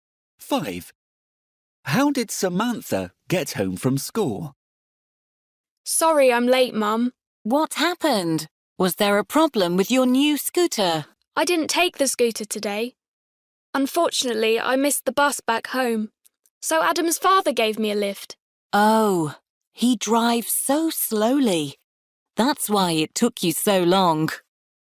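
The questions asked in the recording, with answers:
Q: How did Samantha get home from school?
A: Adam's father drove her (by car)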